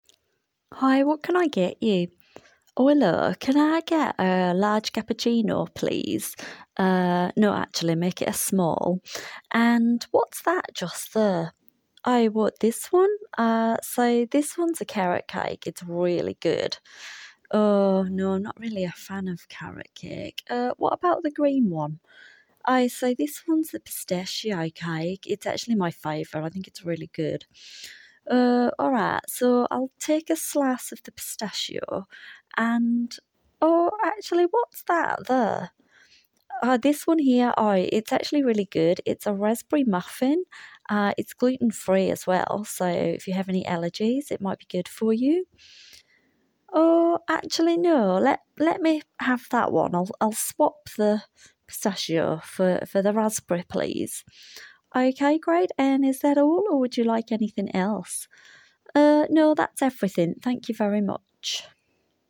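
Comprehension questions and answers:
Tick all the sentences below which are TRUE about the recording. Do not include your own opinion, only use what is on the audio for your answers.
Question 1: The woman orders one large cappuccino.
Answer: False

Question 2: The woman orders one small cappuccino.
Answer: True

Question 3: The server's favourite cake is the green one.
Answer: True

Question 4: The woman buys a piece of the pistachio cake.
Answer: False

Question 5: The woman buys the gluten-free option.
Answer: True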